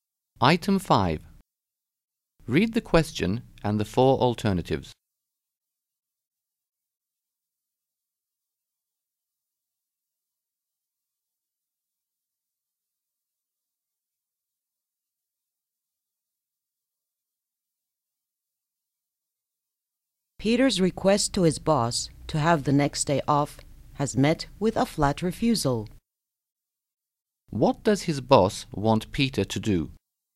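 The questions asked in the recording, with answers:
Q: What does his boss want Peter to do?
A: Come to work the next day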